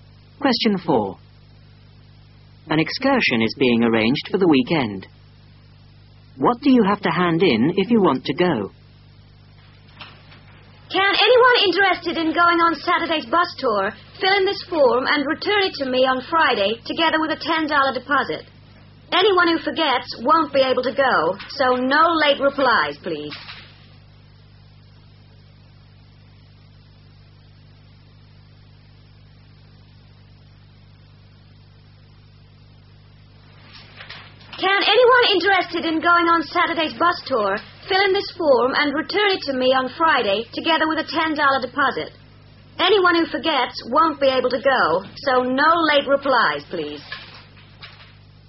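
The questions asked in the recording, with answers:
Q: What do you have to hand in if you want to go?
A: The filled-in form and a $10 deposit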